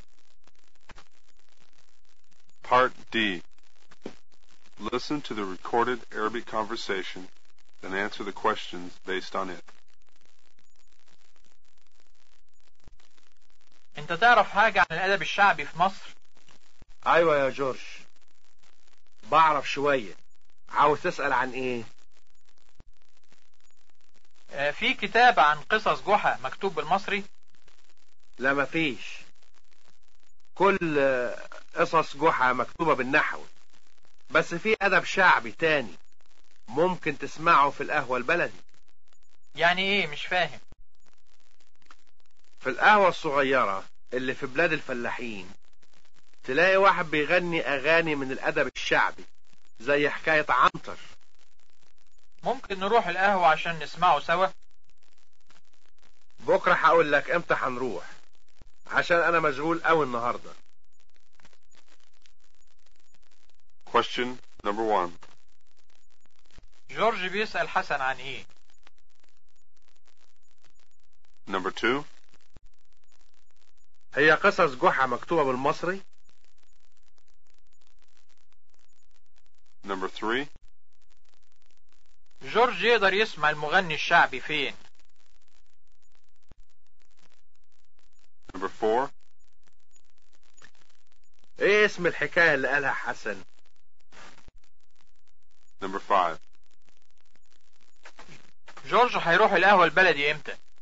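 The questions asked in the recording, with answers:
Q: جورج بيسأل حسن عن ايه؟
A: عن الأدب الشعبي في مصر

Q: هي قصص جحا مكتوبة بالمصري؟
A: لا، مكتوبة بالنحو

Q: جورج يقدر يسمع المغني الشعبي فين؟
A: في القهوة البلدي

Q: ايه اسم الحكاية اللي قالها حسن؟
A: حكاية عنتر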